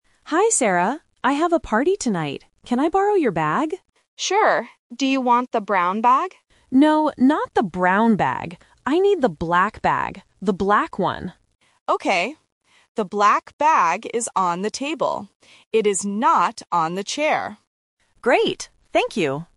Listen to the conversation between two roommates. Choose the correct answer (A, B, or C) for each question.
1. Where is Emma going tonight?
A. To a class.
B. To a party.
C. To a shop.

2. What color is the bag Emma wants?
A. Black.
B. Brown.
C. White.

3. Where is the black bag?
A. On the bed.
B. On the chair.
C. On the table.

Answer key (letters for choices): 1B, 2A, 3C

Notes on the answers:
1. Emma says in her first sentence, "I have a party tonight." Options A and C are not mentioned in the audio.
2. Emma clearly states, "I need the black bag. The black one." Option B (Brown) is the trap because Sarah asks if she wants the brown bag, but Emma says "No." Option C is not mentioned.
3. Sarah tells Emma, "The black bag is on the table." Option B (On the chair) is the trap because Sarah mentions the chair but says the bag is not there ("It is not on the chair"). Option A is not mentioned.

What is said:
Emma: Hi, Sarah. I have a party tonight. Can I borrow your bag?
Sarah: Sure. Do you want the brown bag?
Emma: No, not the brown bag. I need the black bag. The black one.
Sarah: Okay. The black bag is on the table. It is not on the chair.
Emma: Great! Thank you.

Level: A1